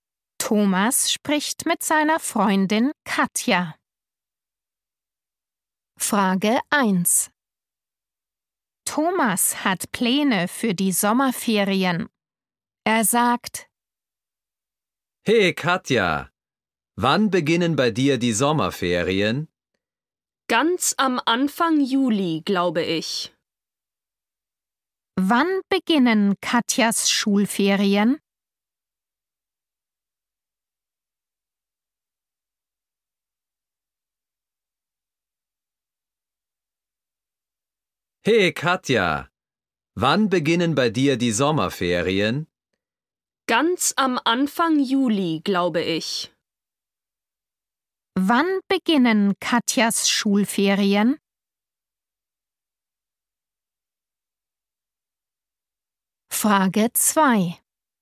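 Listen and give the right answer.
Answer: Ganz am Anfang Juli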